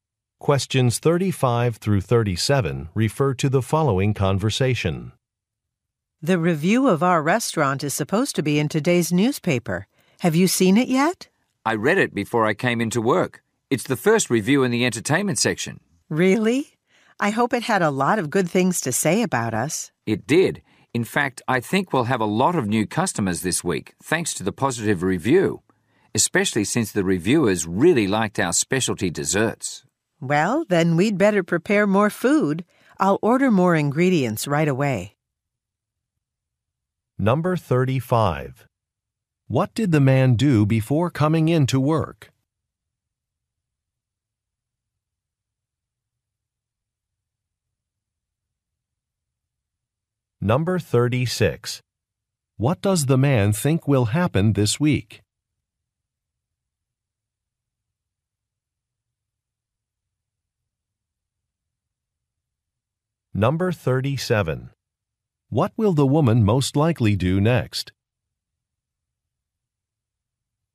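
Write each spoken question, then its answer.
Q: What did the man do before coming in to work?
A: He read the restaurant's review in the newspaper

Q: What does the man think will happen this week?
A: The restaurant will have a lot of new customers

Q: What will the woman most likely do next?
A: Order more ingredients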